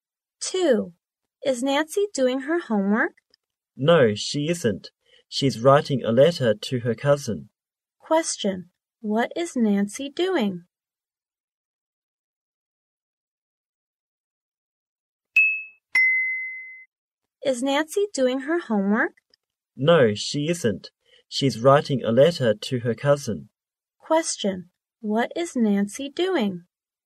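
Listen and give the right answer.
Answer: Writing a letter to her cousin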